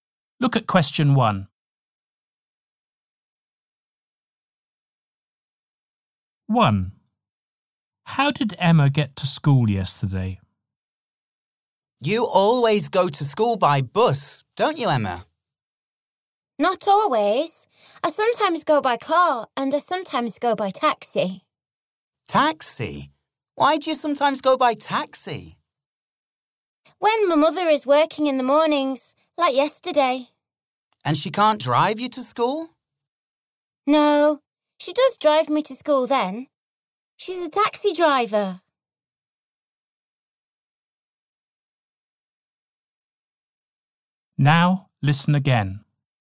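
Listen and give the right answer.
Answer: By taxi (her mother drives a taxi)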